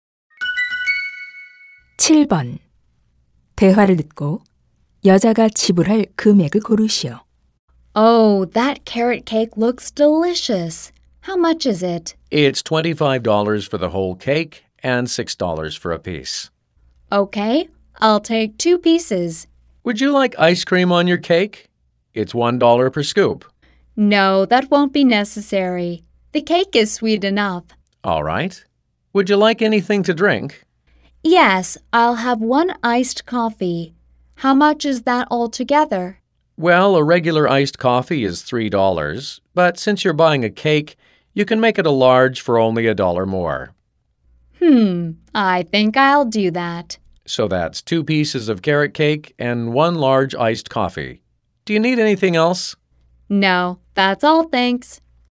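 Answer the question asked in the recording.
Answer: $16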